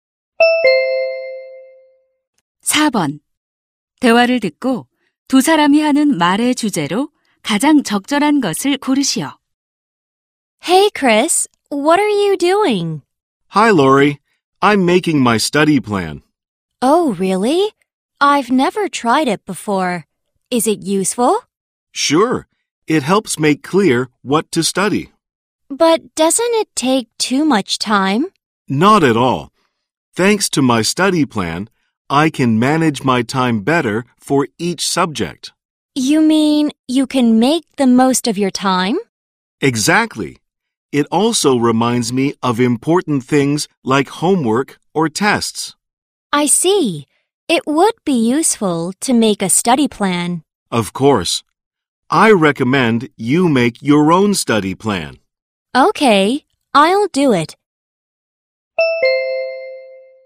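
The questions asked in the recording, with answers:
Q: 대화를 듣고 두 사람이 하는 말의 주제로 가장 적절한 것을 고르시오.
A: 학습 계획표를 세우는 것의 유용성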